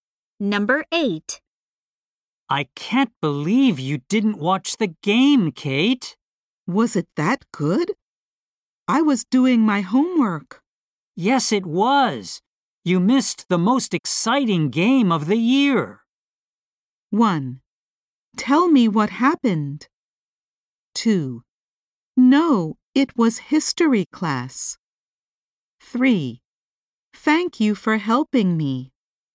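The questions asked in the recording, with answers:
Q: Yes, it was. You missed the most exciting game of the year.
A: 1: Tell me what happened.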